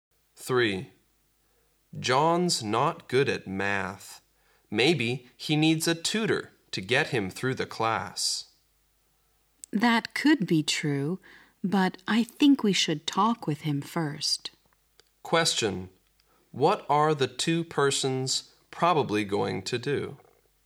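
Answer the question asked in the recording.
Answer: Talk with John first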